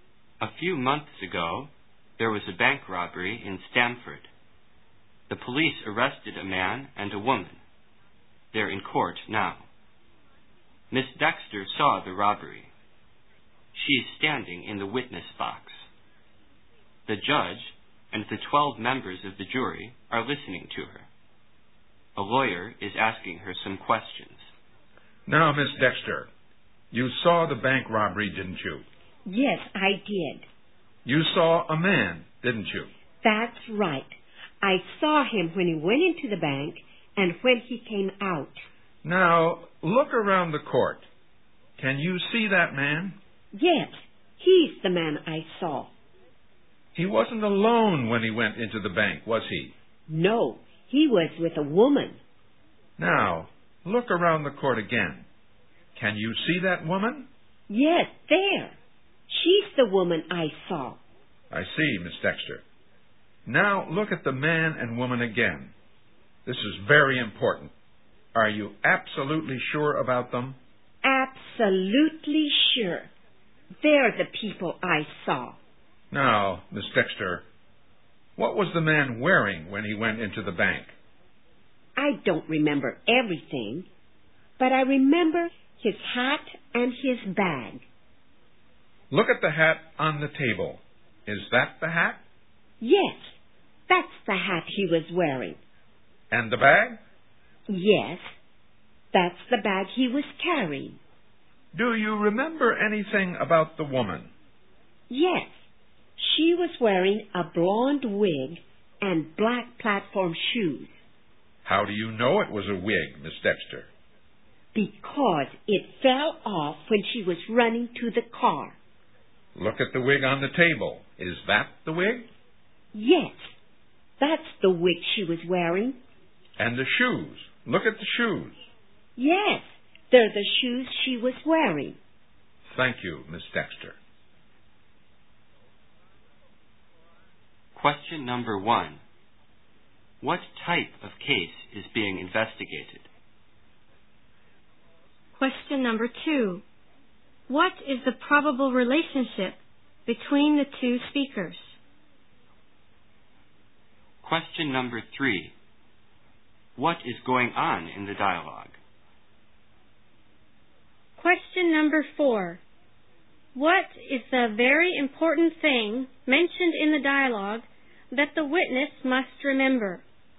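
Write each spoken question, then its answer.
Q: What type of case is being investigated?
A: A bank robbery

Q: What is the probable relationship between the two speakers?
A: Lawyer and witness

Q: What is going on in the dialogue?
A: A witness is being questioned in court

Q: What is the very important thing mentioned in the dialogue that the witness must remember?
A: Whether she is absolutely sure the man and woman are the robbers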